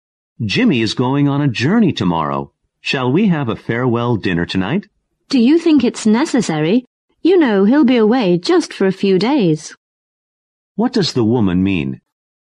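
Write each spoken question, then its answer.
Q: What does the woman mean?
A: A farewell dinner isn't necessary.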